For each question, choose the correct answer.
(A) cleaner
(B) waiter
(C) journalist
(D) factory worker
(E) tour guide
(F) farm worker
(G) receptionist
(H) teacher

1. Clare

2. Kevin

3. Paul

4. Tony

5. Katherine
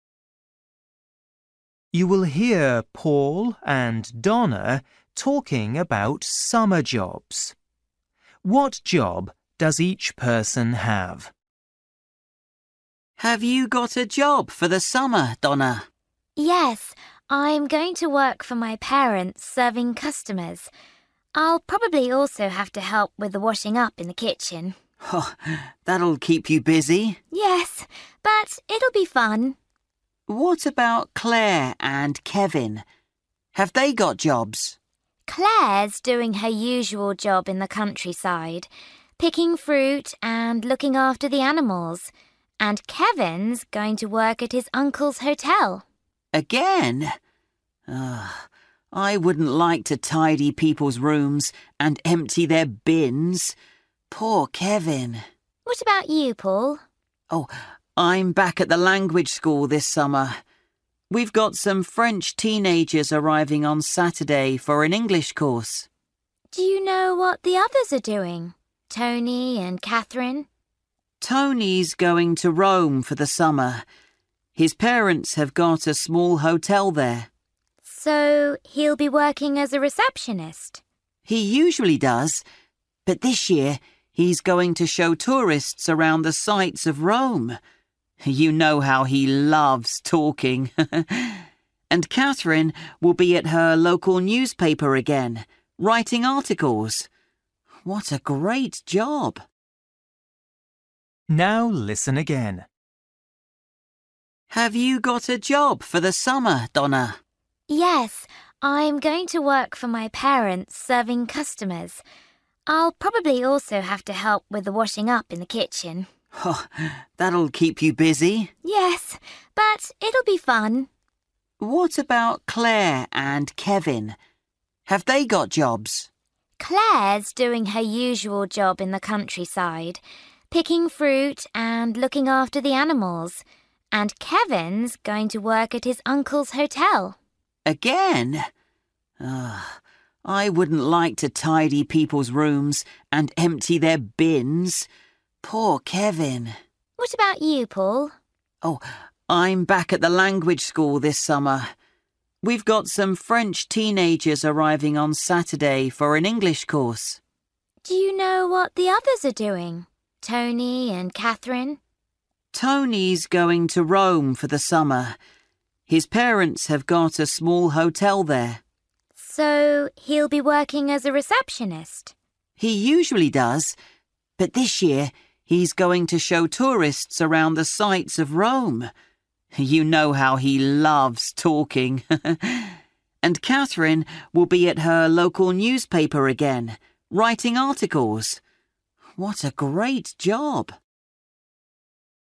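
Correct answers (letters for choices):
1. F
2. A
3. H
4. E
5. C

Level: Luyện nghe trình độ A2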